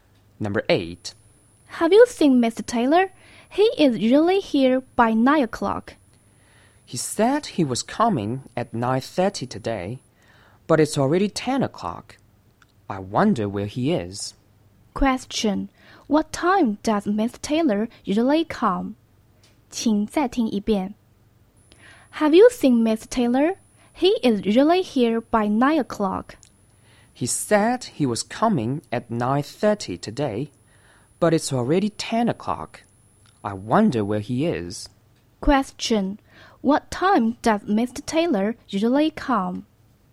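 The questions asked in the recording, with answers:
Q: Question. What time does Miss Taylor usually come?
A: By 9 o'clock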